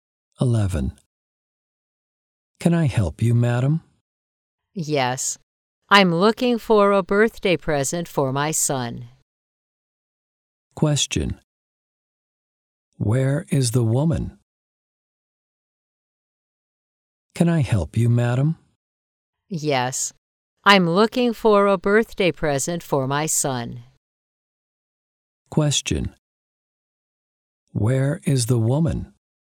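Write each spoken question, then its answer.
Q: Where is the woman?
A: In a shop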